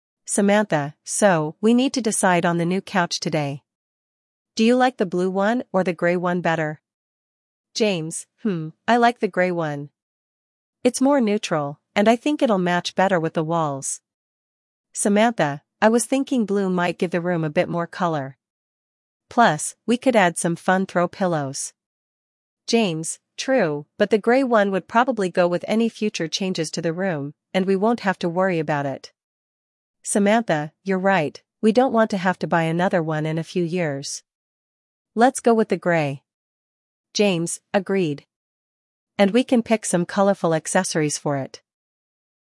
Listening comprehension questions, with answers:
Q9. What two colors of couches are being considered?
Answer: Blue and grey

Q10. Why does James prefer the grey couch?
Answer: Neutral, matches the walls

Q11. What does Samantha think about the blue couch?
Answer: Blue would add color

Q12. What do they decide at the end?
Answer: Grey one

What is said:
Samantha: So, we need to decide on the new couch today. Do you like the blue one or the grey one better?
James: Hmm, I like the grey one. It's more neutral, and I think it'll match better with the walls.
Samantha: I was thinking blue might give the room a bit more color. Plus, we could add some fun throw pillows.
James: True, but the grey one would probably go with any future changes to the room, and we won't have to worry about it.
Samantha: You're right, we don't want to have to buy another one in a few years. Let's go with the grey.
James: Agreed. And we can pick some colorful accessories for it.